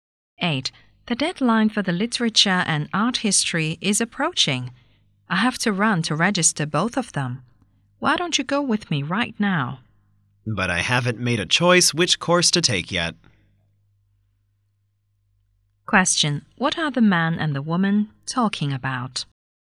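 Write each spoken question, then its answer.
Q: What are the man and the woman talking about?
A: Choosing and registering for a course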